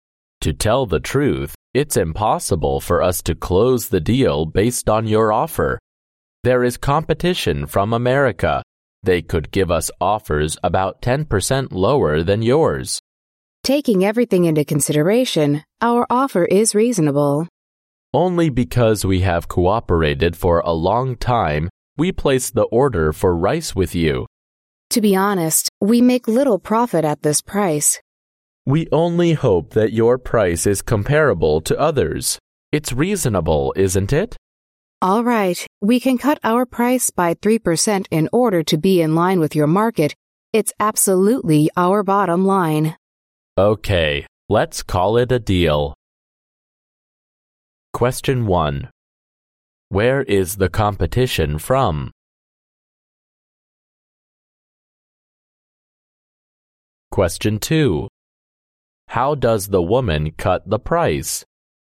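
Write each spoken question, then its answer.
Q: Where is the competition from?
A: America

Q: How does the woman cut the price?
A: By 3%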